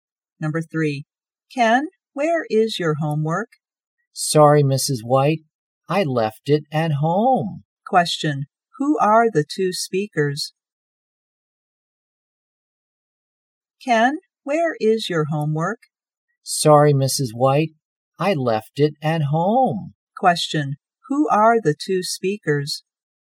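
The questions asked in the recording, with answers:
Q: Question, who are the two speakers?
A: A teacher and a student.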